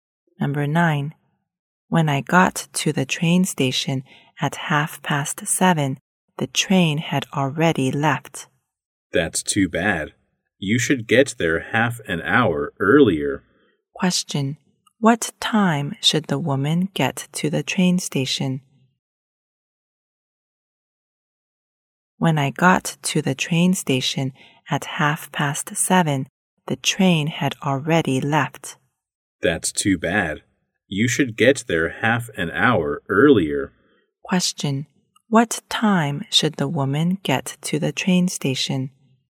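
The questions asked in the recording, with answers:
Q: Question. What time should the woman get to the train station?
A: At 7:00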